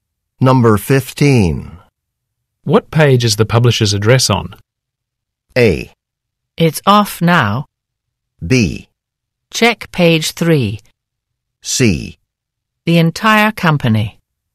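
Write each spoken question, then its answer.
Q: What page is the publisher's address on?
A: B: Check page 3.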